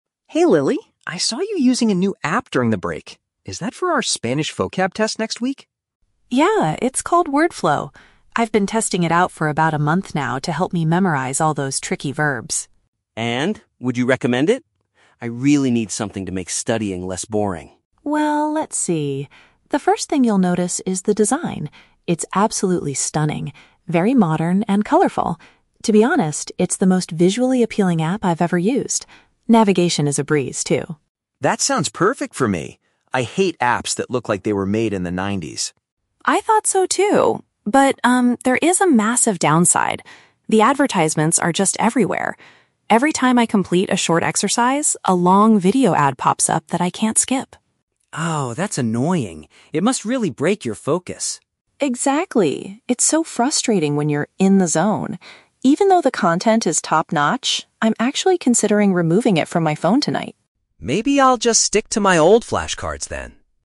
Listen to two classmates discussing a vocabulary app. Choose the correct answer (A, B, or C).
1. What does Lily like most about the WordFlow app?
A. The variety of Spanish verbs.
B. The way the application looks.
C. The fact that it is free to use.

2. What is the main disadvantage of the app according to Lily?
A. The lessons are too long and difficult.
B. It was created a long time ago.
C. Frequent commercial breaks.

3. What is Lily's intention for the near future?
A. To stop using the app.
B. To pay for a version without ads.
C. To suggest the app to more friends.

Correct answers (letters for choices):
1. B
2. C
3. A

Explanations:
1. Lily says the design is "absolutely stunning" and "the most visually appealing app" she has used. This is a paraphrase of "the way it looks." The Trap: Option (A) is mentioned (Spanish verbs), but that is what she studies, not what she likes most about the app itself.
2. Lily complains that "advertisements are just everywhere" and they pop up after every exercise. "Commercial breaks" is a synonym for "advertisements." The Trap: Option (B) is a trap because James mentions apps "made in the nineties," but Lily actually describes WordFlow as modern.
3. Lily states she is "considering removing it from my phone tonight" because the ads are so frustrating. "Removing an app" means she will stop using it. The Trap: Option (B) is a common real-world solution, but Lily never mentions paying for a premium version. Option (C) is wrong because her review is mostly negative regarding the user experience.

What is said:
James: Hey Lily, I saw you using a new app during the break. Is that for our Spanish vocab test next week?
Lily: Yeah, it's called WordFlow. I've been testing it out for about a month now to help me memorize all those tricky verbs.
James: And? Would you recommend it? I really need something to make studying less boring.
Lily: Well, let's see. The first thing you'll notice is the design. It's absolutely stunning—very modern and colorful. To be honest, it's the most visually appealing app I've ever used. Navigation is a breeze, too.
James: That sounds perfect for me. I hate apps that look like they were made in the nineties!
Lily: I thought so, too. But, um, there is a massive downside. The advertisements are just everywhere. Every time I complete a short exercise, a long video ad pops up that I can't skip.
James: Oh, that's annoying. It must really break your focus.
Lily: Exactly! It's so frustrating when you're "in the zone." Even though the content is top-notch, I'm actually considering removing it from my phone tonight.
James: Maybe I'll just stick to my old flashcards then.